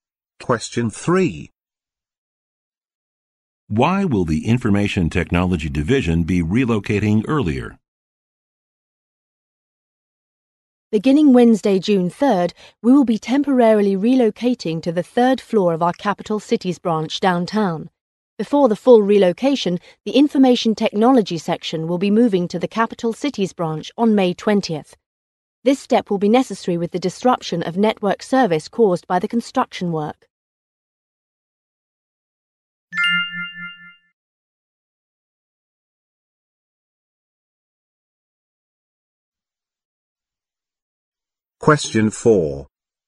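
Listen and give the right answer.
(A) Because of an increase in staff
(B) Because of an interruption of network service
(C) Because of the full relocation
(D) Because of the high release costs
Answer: (B) Because of an interruption of network service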